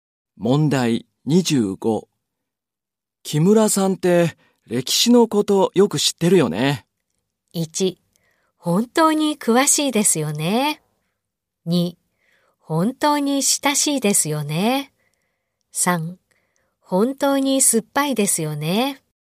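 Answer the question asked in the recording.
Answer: 1: 本当に詳しいですよね。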